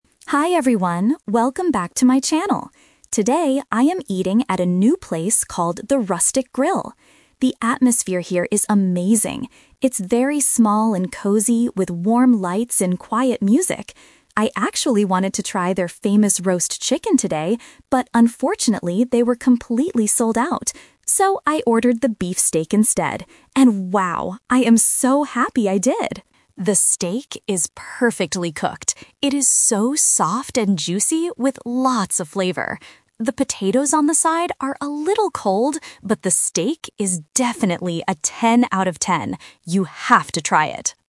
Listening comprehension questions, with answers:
Listen to the food vlogger reviewing a restaurant, and choose the correct answer (A, B, or C) for each question.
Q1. How does the vlogger describe the restaurant's atmosphere?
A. Small and cozy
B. Big and bright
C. Loud and crowded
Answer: A. Small and cozy

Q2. What did the vlogger order to eat?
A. Roast chicken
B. Beef steak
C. Grilled fish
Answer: B. Beef steak

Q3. What is the vlogger's only complaint about the meal?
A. The steak is too tough.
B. The food is too expensive.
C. The potatoes are cold.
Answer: C. The potatoes are cold.

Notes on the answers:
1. The vlogger clearly says, "It's very small and cozy, with warm lights..." Options (B) and (C) are plausible descriptions for other restaurants, but they are the opposite of what is mentioned in the audio.
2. The vlogger says, "So, I ordered the beef steak instead." Option (A) is the trap; the vlogger originally wanted the roast chicken, but it was sold out. Option (C) is a plausible food item but is never mentioned.
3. Near the end, the vlogger says, "The potatoes on the side are a little cold." Option (A) is a trap; the steak is actually described as "soft and juicy," which means it is very good, not tough. Option (B) is a common restaurant complaint, but money is not discussed in the review.

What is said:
Vlogger: Hi everyone, welcome back to my channel! Today, I am eating at a new place called The Rustic Grill. The atmosphere here is amazing. It's very small and cozy, with warm lights and quiet music. I actually wanted to try their famous roast chicken today, but unfortunately, they were completely sold out. So, I ordered the beef steak instead. And wow, I am so happy I did! The steak is perfectly cooked. It is so soft and juicy, with lots of flavor. The potatoes on the side are a little cold, but the steak is definitely a ten out of ten. You have to try it!

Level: A2

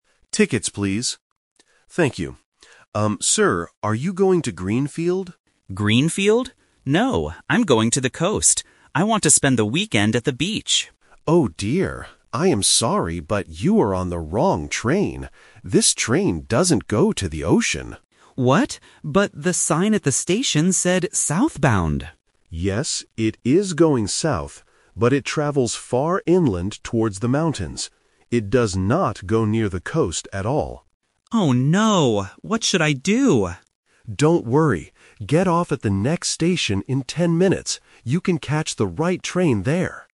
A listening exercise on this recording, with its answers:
Listen to the conversation between a passenger and a train conductor. Choose the correct answer (A, B, or C) for each question.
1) Where does the passenger want to go?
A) To Greenfield.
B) To the coast.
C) To the mountains.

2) Where is this train actually traveling to?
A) It is going to the ocean.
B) It is going back to the city.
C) It is traveling inland.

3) What does the conductor tell the passenger to do?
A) Buy a new ticket.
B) Get off at the next station.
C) Stay on the train until the end.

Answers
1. B) To the coast.
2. C) It is traveling inland.
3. B) Get off at the next station.

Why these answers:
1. Why B is correct: The passenger clearly states his plan: "No, I'm going to the coast. I want to spend the weekend at the beach." Why A is a trap: "Greenfield" is the first place mentioned in the audio, but it is just the conductor's guess, which the passenger rejects. Why C is a trap: The mountains are mentioned later, but that is where the train is actually going, not where the passenger wants to go.
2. Why C is correct: The conductor explains the train's real route: "it travels far inland towards the mountains." Why A is a trap: The ocean is the passenger's desired destination, but the conductor explicitly says, "This train doesn't go to the ocean." Why B is wrong: Going back to the city is never mentioned in the conversation.
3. Why B is correct: The conductor gives a clear solution to the problem: "Don't worry. Get off at the next station in ten minutes." Why A is wrong: Buying a new ticket is a plausible action when you make a mistake, but it is not mentioned in the audio. Why C is a trap: This is the opposite of what he should do. If he stays on the train, he will end up in the mountains.

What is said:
Conductor: Tickets, please. Thank you. Um, sir, are you going to Greenfield?
Passenger: Greenfield? No, I'm going to the coast. I want to spend the weekend at the beach.
Conductor: Oh, dear. I am sorry, but you are on the wrong train. This train doesn't go to the ocean.
Passenger: What? But the sign at the station said "Southbound"!
Conductor: Yes, it is going South, but it travels far inland towards the mountains. It does not go near the coast at all.
Passenger: Oh no! What should I do?
Conductor: Don't worry. Get off at the next station in ten minutes. You can catch the right train there.

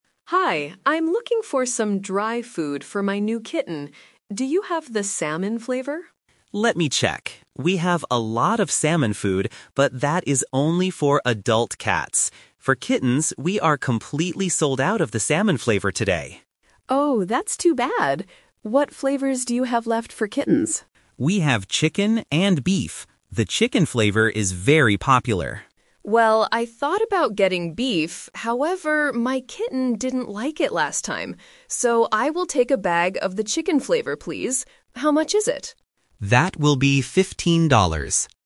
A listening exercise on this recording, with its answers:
Listen to the conversation between a customer and a pet shop assistant, and choose the correct answer (A, B, or C).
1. What flavor of food did the customer want to buy at first?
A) Chicken.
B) Beef.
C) Salmon.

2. Why couldn't the customer buy the salmon food?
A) Because it was too expensive.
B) Because the shop only had it for adult cats.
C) Because the kitten is allergic to fish.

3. What does the customer finally decide to buy?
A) The chicken flavor.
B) The beef flavor.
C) The salmon flavor for adult cats.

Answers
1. C) Salmon.
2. B) Because the shop only had it for adult cats.
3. A) The chicken flavor.

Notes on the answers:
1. At the beginning, the customer asks, "Do you have the salmon flavor?". Option (A) is the trap because it is what she buys at the end, not what she wanted at first. Option (B) is also mentioned but was not her first choice.
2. The assistant explains that they have salmon food, "but that is only for adult cats," and they are "completely sold out" for kittens. Option (A) and (C) are plausible reasons in real life but are not mentioned in the audio.
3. The customer makes her final decision by saying, "So, I will take a bag of the chicken flavor, please." Option (B) is the trap; she thought about getting beef, but her kitten didn't like it last time. Option (C) is a distractor.

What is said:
Customer: Hi, I'm looking for some dry food for my new kitten. Do you have the salmon flavor?
Assistant: Let me check. We have a lot of salmon food, but that is only for adult cats. For kittens, we are completely sold out of the salmon flavor today.
Customer: Oh, that's too bad. What flavors do you have left for kittens?
Assistant: We have chicken and beef. The chicken flavor is very popular.
Customer: Well, I thought about getting beef, however, my kitten didn't like it last time. So, I will take a bag of the chicken flavor, please. How much is it?

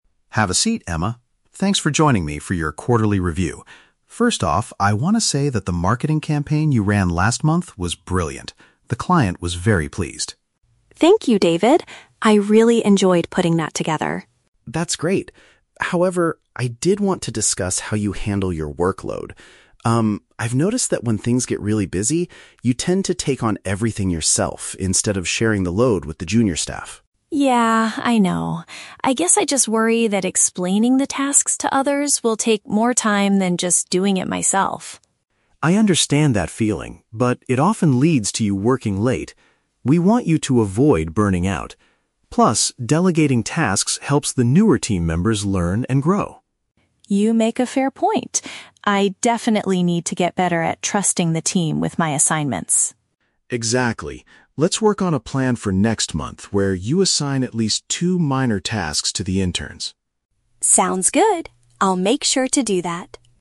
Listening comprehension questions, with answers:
Listen to the performance review conversation between a manager and his employee, then choose the correct answer (A, B, or C).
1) What is the manager's opinion of Emma's recent work?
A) He wants her to redesign the previous marketing campaign.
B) He expects her to ask the customers for more feedback.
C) He is highly satisfied with the results she delivered to the client.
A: C) He is highly satisfied with the results she delivered to the client.

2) According to David, what area does Emma need to improve in?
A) Giving some of her work to less experienced colleagues.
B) Teaching the interns how to use the company's software.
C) Leaving the office earlier to spend more time with her family.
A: A) Giving some of her work to less experienced colleagues.

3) Why does Emma usually avoid doing what David suggests?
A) She hopes that doing everything herself will get her a promotion.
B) She does not trust the new employees' professional skills.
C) She is concerned that showing others what to do will take too long.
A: C) She is concerned that showing others what to do will take too long.

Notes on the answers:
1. David says her marketing campaign was "brilliant" and the client was "very pleased." Option C accurately paraphrases this as being "highly satisfied with the results."
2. David points out that she needs to start "sharing the load with the junior staff" and "delegating tasks." Option A uses synonyms ("giving some of her work", "less experienced colleagues") to match this idea.
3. Emma admits she worries that "explaining the tasks to others will take more time." Option C perfectly paraphrases this as "showing others what to do will take too long."

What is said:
David: Have a seat, Emma. Thanks for joining me for your quarterly review. First off, I want to say that the marketing campaign you ran last month was brilliant. The client was very pleased.
Emma: Thank you, David. I really enjoyed putting that together.
David: That's great. However, I did want to discuss how you handle your workload. Um, I've noticed that when things get really busy, you tend to take on everything yourself instead of sharing the load with the junior staff.
Emma: Yeah, I know. I guess I just worry that explaining the tasks to others will take more time than just doing it myself.
David: I understand that feeling, but it often leads to you working late. We want you to avoid burning out. Plus, delegating tasks helps the newer team members learn and grow.
Emma: You make a fair point. I definitely need to get better at trusting the team with my assignments.
David: Exactly. Let's work on a plan for next month where you assign at least two minor tasks to the interns.
Emma: Sounds good. I'll make sure to do that.

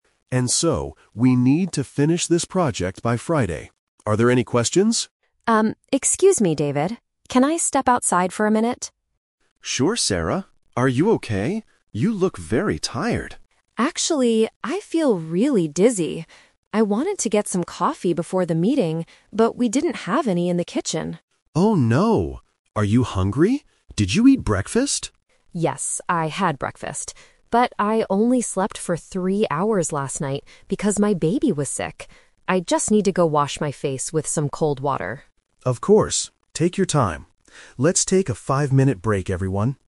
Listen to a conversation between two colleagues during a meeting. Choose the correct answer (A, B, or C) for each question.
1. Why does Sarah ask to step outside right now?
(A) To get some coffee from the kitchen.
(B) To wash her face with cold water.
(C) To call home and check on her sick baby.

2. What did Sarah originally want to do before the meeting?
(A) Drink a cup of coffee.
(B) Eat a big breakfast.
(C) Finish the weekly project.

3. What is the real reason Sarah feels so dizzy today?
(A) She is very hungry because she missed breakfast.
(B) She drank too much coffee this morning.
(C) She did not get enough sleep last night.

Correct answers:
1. (B) To wash her face with cold water.
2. (A) Drink a cup of coffee.
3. (C) She did not get enough sleep last night.

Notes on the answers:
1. Sarah says, "I just need to go wash my face with some cold water." The Trap: Option A is a trap. Sarah mentions the kitchen, but there was no coffee there. Option C is a trap because she mentions her baby was sick last night, but she is not leaving the room to call home.
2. Sarah says, "I wanted to get some coffee before the meeting..." This was her original plan (The Twist). The Trap: Option B is a trap. David asks if she ate breakfast, and she says she did, but it wasn't what she wanted to do right before the meeting. Option C is mentioned by David at the very beginning of the audio, but it is not Sarah's action.
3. Sarah explains her dizziness by saying, "I only slept for three hours last night." This means she did not get enough sleep. The Trap: Option A is the A2 trap. David asks "Are you hungry? Did you eat breakfast?" but Sarah rejects this reason by saying "Yes, I had breakfast." Option B is the exact opposite of the truth (she had no coffee at all).

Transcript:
David: ...and so, we need to finish this project by Friday. Are there any questions?
Sarah: Um, excuse me, David. Can I step outside for a minute?
David: Sure, Sarah. Are you okay? You look very tired.
Sarah: Actually, I feel really dizzy. I wanted to get some coffee before the meeting, but we didn't have any in the kitchen.
David: Oh no. Are you hungry? Did you eat breakfast?
Sarah: Yes, I had breakfast. But I only slept for three hours last night because my baby was sick. I just need to go wash my face with some cold water.

